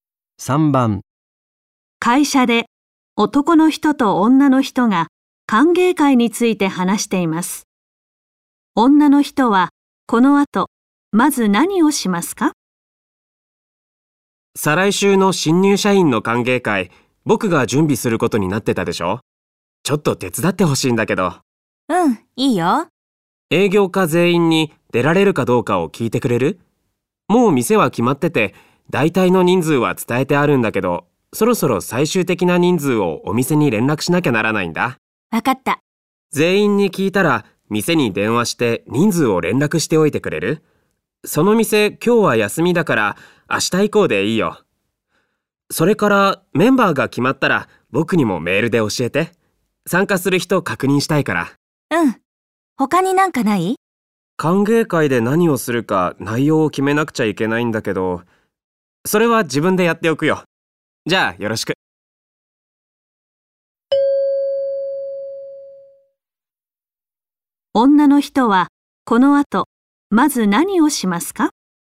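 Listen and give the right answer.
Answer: 営業課全員に歓迎会に出られるか聞く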